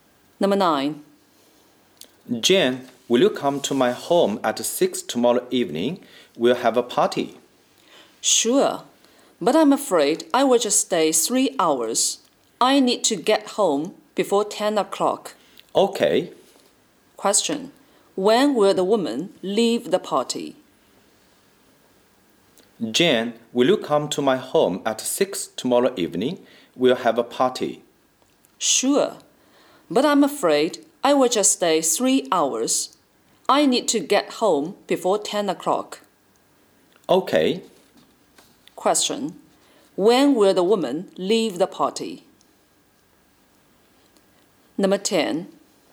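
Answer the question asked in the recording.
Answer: At 9 o'clock tomorrow evening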